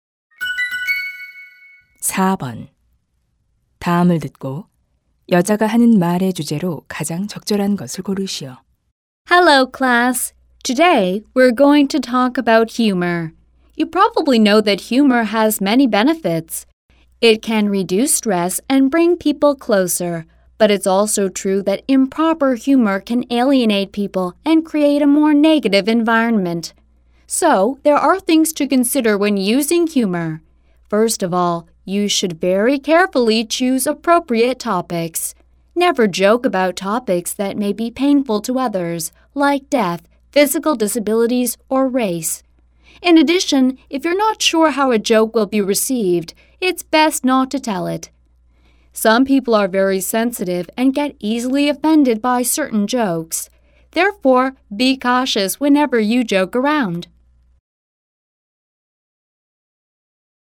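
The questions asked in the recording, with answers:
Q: 다음을 듣고 여자가 하는 말의 주제로 가장 적절한 것을 고르시오.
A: 유머를 사용할 때 주의할 점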